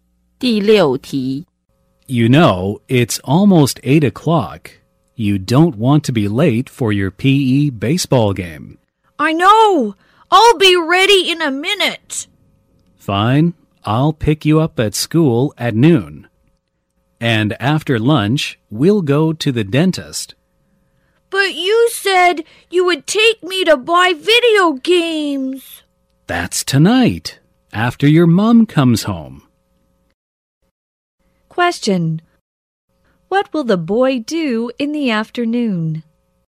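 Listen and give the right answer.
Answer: Go to the dentist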